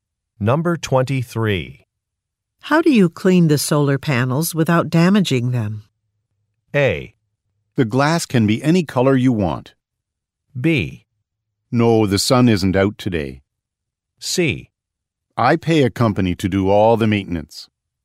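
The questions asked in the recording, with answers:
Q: How do you clean the solar panels without damaging them?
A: C: I pay a company to do all the maintenance.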